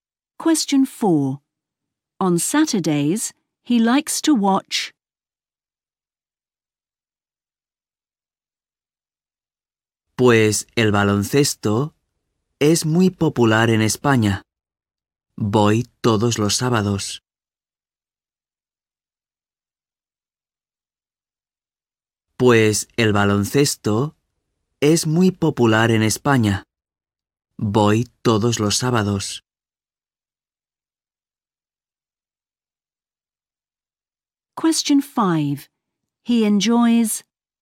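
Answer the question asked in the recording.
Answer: basketball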